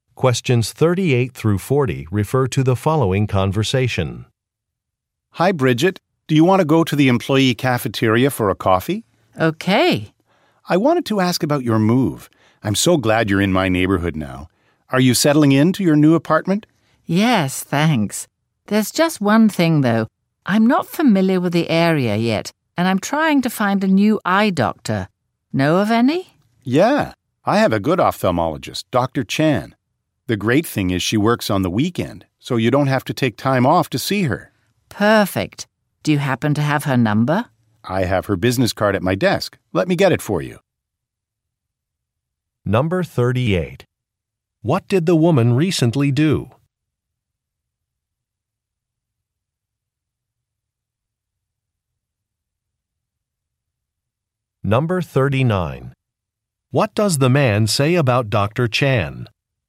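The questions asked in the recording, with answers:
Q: What did the woman recently do?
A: She moved to a new apartment.

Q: What does the man say about Dr. Chan?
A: She works on the weekend.

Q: What does the man say he will do?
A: Get Dr. Chan's business card from his desk.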